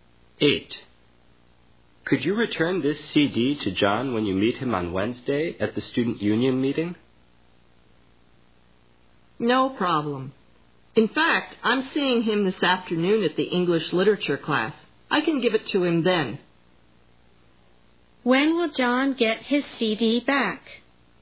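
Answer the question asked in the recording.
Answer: This afternoon, at the English literature class.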